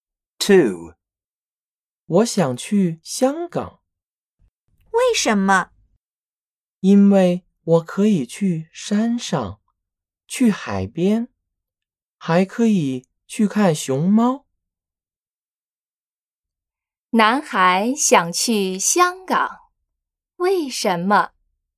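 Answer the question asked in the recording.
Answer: 因为可以去山上,去海边,还可以去看熊猫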